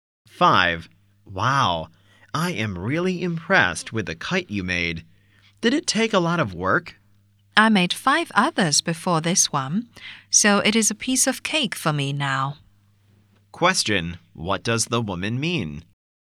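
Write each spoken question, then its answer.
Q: What does the woman mean?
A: Making kites is easy for her now.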